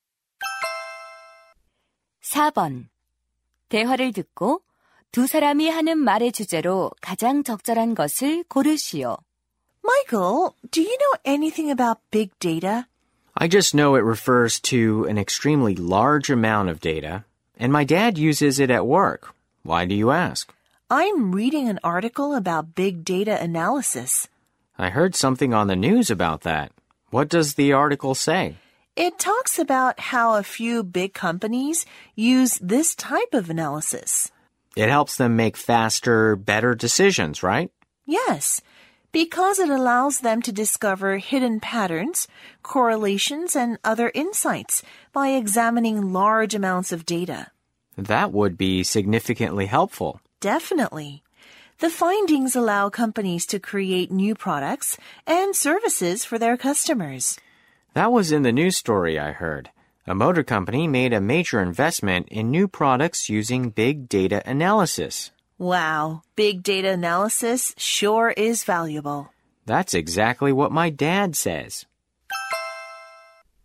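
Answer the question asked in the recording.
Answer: 빅데이터 분석의 유용성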